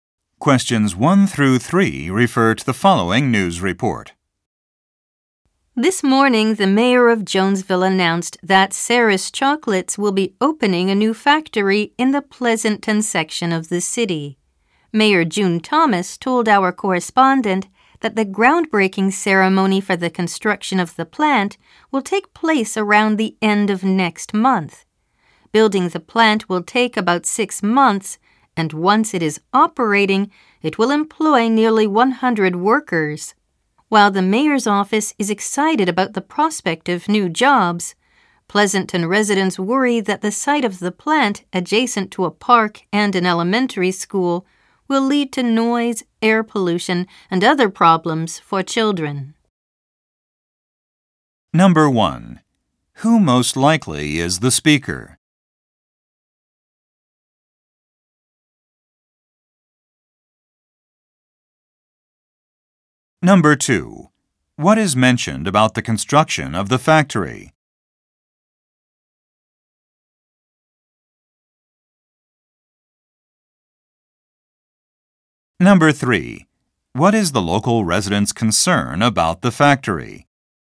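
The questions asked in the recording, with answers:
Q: Who most likely is the speaker?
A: A news reporter

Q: What is the local resident's concern about the factory?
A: Noise and air pollution near a park and school, affecting children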